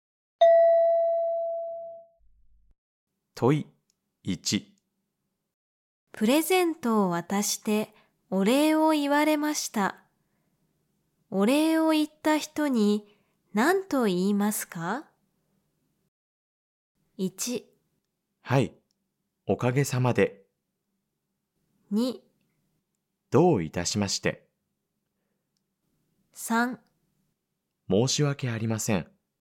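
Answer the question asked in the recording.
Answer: 2: どういたしまして。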